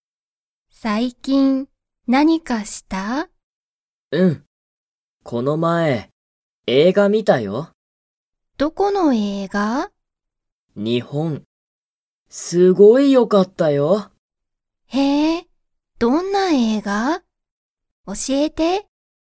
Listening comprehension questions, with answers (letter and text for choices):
その映画えいがは____。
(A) 全然ぜんぜんよくなかった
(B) すごいよかった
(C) あまりよくなかった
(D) 少すこしだけよかった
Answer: (B) すごいよかった

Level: Level 1